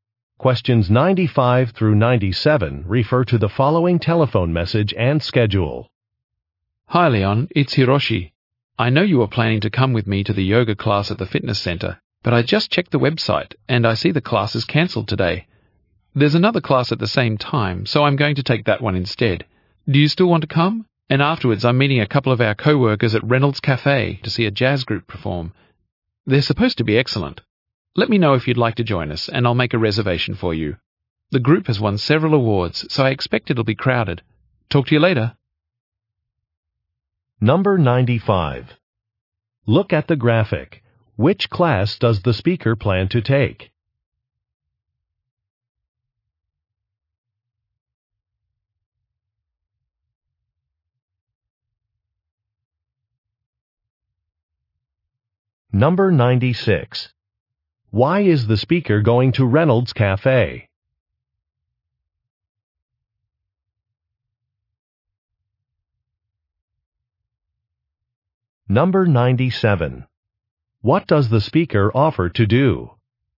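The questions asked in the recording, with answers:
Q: Why is the speaker going to Reynolds Cafe?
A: To see a jazz group perform

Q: What does the speaker offer to do?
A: Make a reservation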